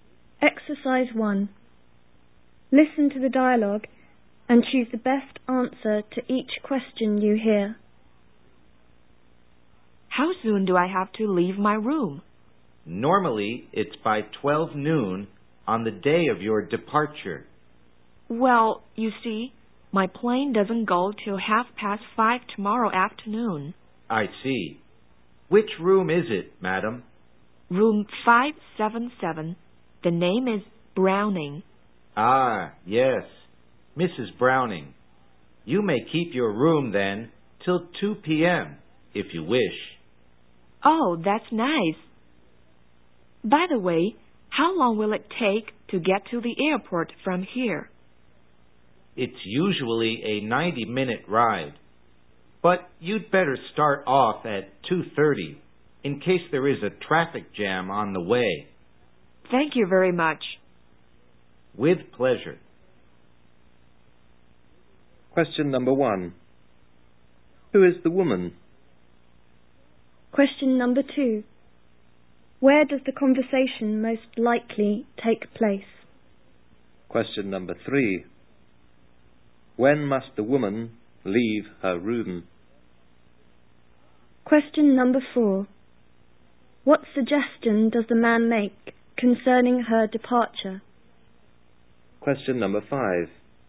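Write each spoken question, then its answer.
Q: Who is the woman?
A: A hotel guest (Mrs. Browning)

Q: Where does the conversation most likely take place?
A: At a hotel

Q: When must the woman leave her room?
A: By 2 p.m.

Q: What suggestion does the man make concerning her departure?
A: Start off for the airport at 2:30 in case of a traffic jam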